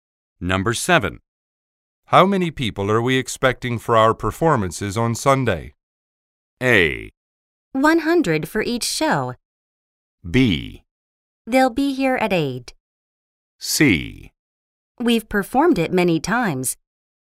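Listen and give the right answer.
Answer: A: 100 for each show.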